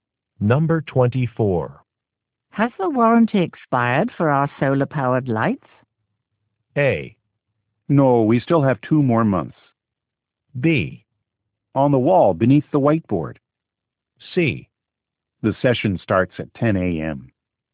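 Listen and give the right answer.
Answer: A: No, we still have 2 more months.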